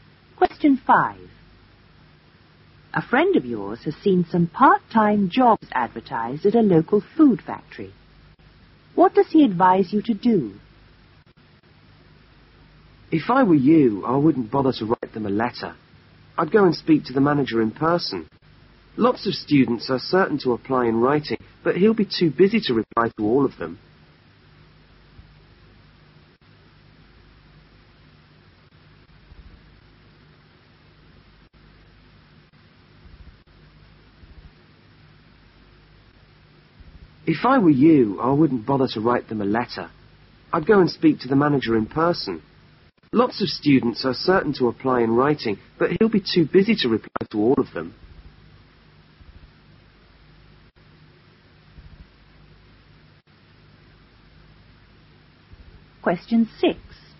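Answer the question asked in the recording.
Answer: Go and speak to the manager in person, not write a letter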